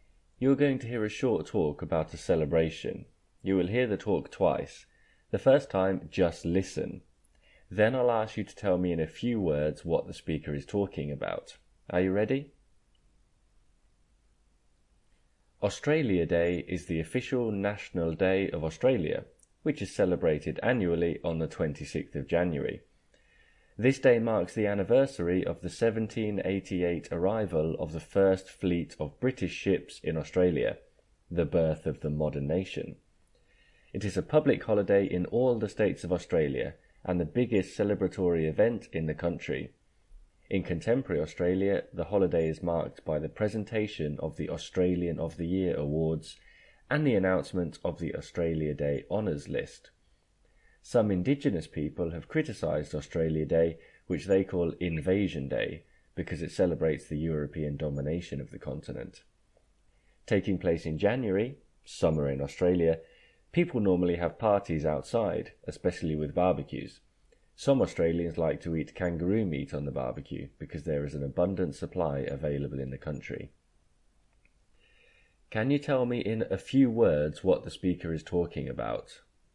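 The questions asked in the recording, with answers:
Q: Can you tell me in a few words what the speaker is talking about?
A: Australia Day, Australia's national day celebration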